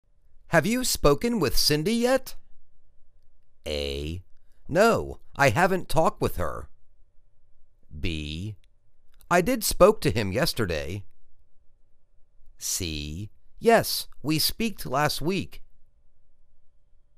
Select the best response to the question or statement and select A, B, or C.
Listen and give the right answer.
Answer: No, I haven't talked with her.